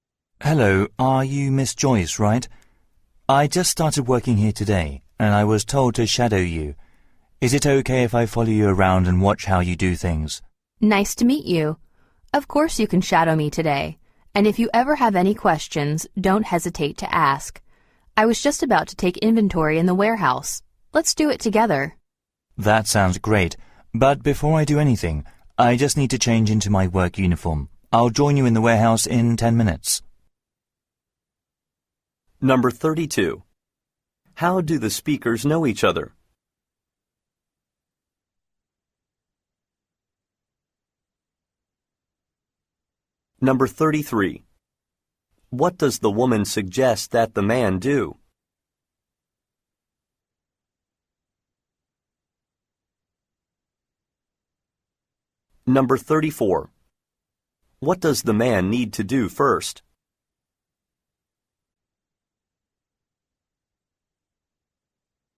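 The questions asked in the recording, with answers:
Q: How do the speakers know each other?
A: They are coworkers; the man just started and is shadowing the woman

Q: What does the woman suggest that the man do?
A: Take inventory in the warehouse with her

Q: What does the man need to do first?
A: Change into his work uniform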